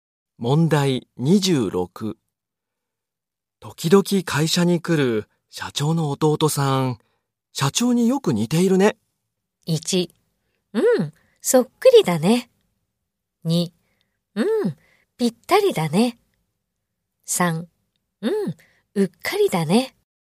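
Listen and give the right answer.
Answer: 1: うん、そっくりだね。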